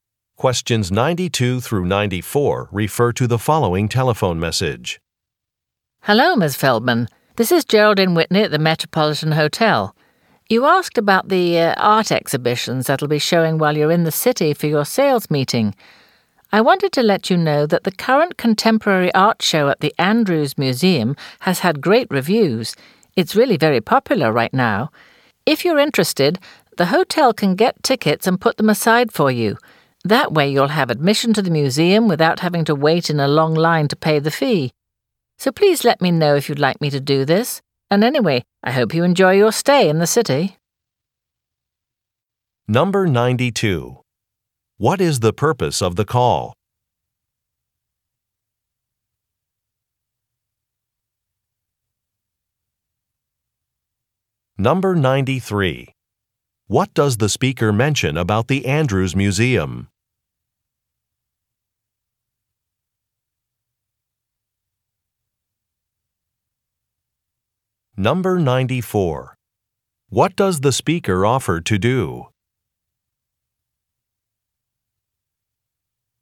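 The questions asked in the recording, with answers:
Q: What is the purpose of the call?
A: To give information about an art exhibition

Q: What does the speaker mention about the Andrews Museum?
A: Its contemporary art show is very popular and well reviewed

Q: What does the speaker offer to do?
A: Get tickets and hold them for her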